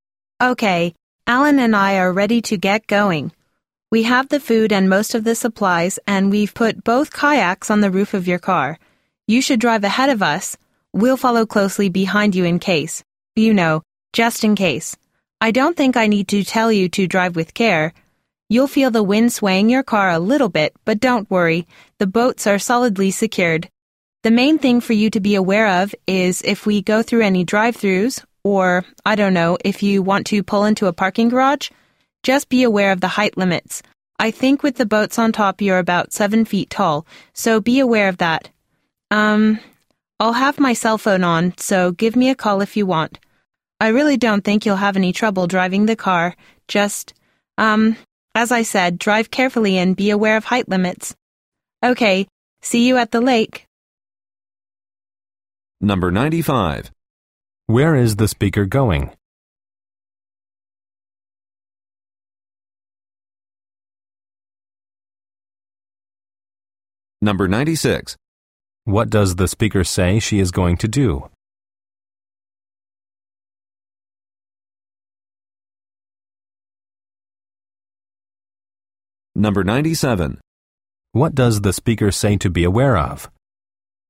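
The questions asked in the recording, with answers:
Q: Where is the speaker going?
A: To the lake

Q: What does the speaker say she is going to do?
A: Follow closely behind the listener's car

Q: What does the speaker say to be aware of?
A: Height limits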